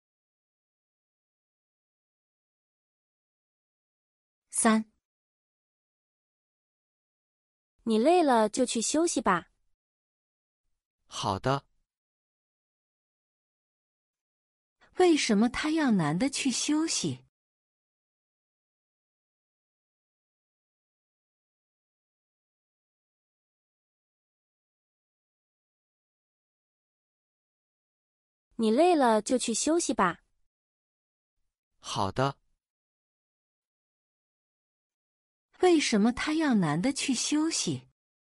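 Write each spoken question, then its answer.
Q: 为什么他要男的去休息?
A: 因为男的累了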